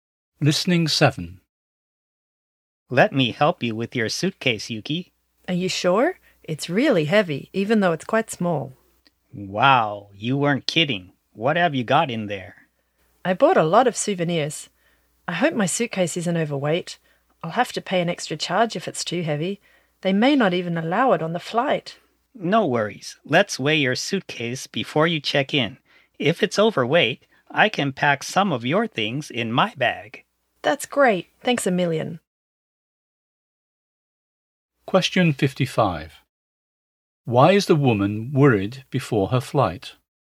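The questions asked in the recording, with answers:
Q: Why is the woman worried before her flight?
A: Her suitcase might be overweight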